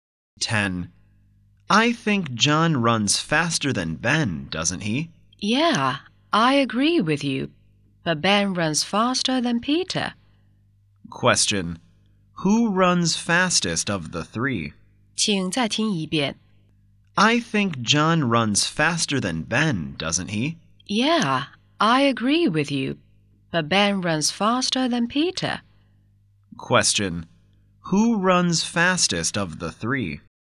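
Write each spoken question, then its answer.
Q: Who runs fastest of the three?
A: John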